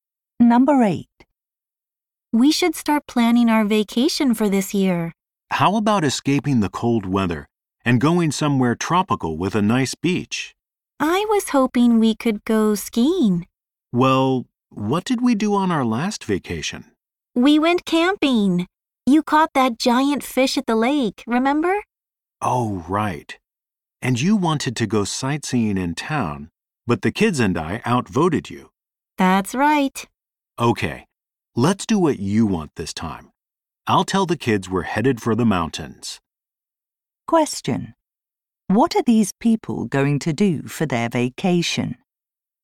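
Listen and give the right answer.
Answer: Go skiing in the mountains.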